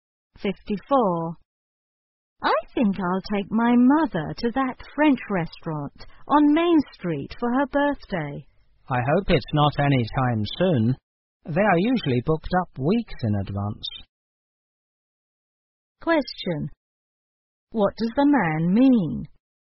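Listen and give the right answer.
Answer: She should book the restaurant well in advance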